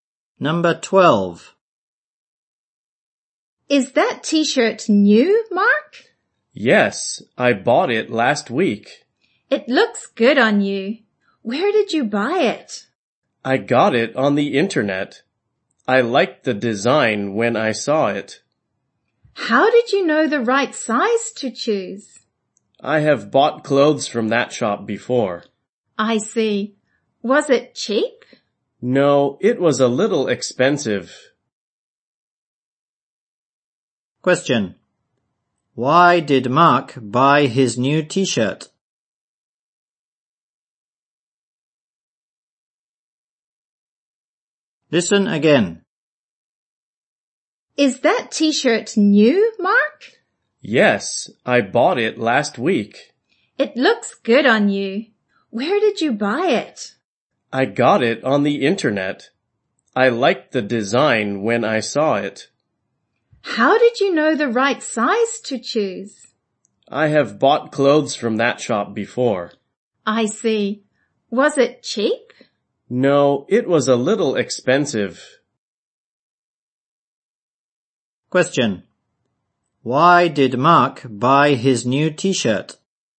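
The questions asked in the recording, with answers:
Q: Why did Mark buy his new t-shirt?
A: He liked the design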